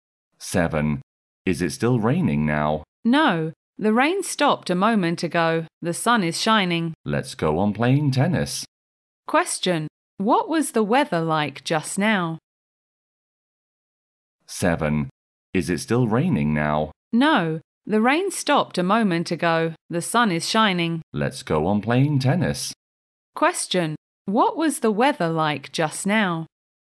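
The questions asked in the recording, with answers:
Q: What was the weather like just now?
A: It was raining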